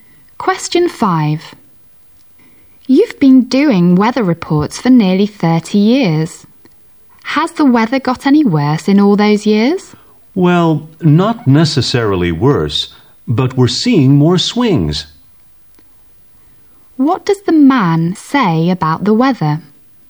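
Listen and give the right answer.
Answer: It is not necessarily worse but has more swings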